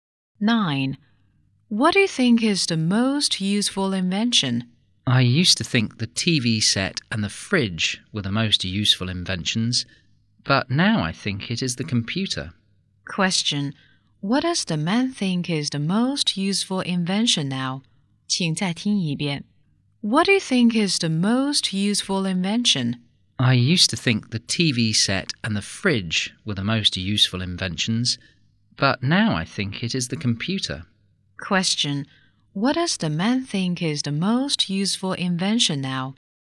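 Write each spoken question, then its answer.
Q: Question, what does the man think is the most useful invention now?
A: The computer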